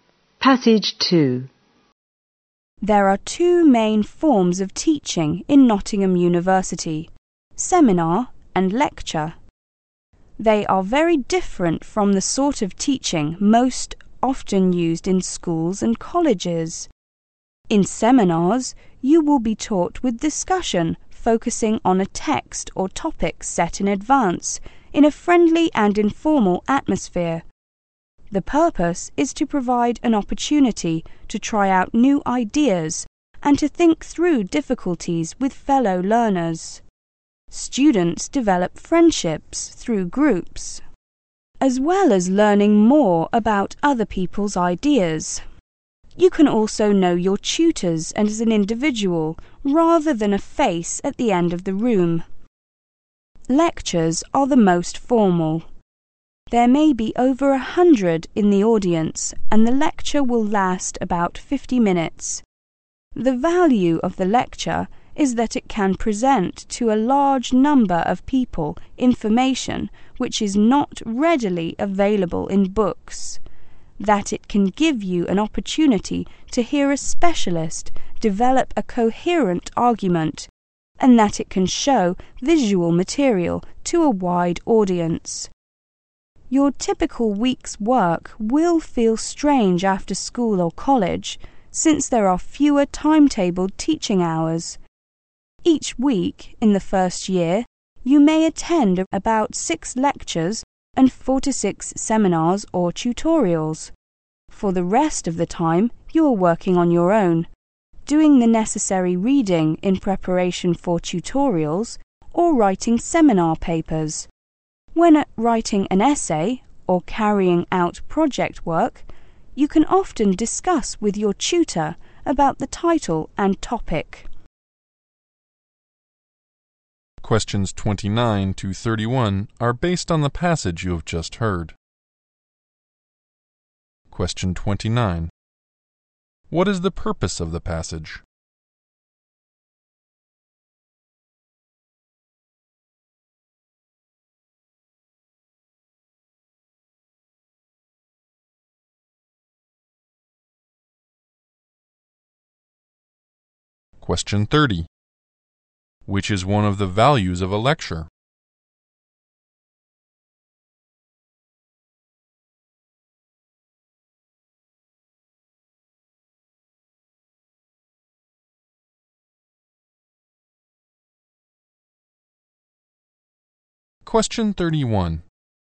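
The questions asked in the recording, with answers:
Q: What is the purpose of the passage?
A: To introduce the forms of teaching at Nottingham University

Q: Which is one of the values of a lecture?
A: It presents information not readily available in books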